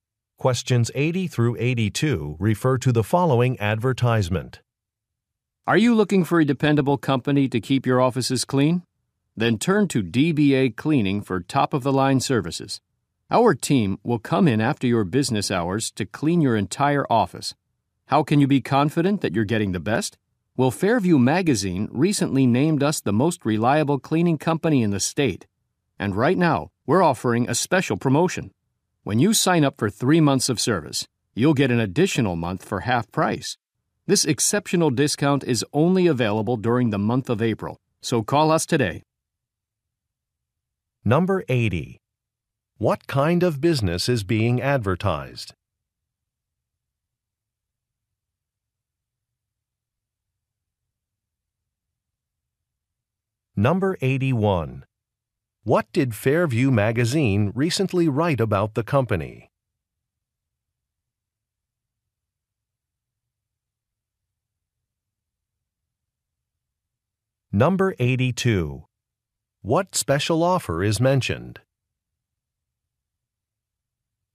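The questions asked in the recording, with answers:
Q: What kind of business is being advertised?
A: An office cleaning company

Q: What did Fairview Magazine recently write about the company?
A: It is the most reliable cleaning company in the state

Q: What special offer is mentioned?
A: An extra month at half price when signing up for 3 months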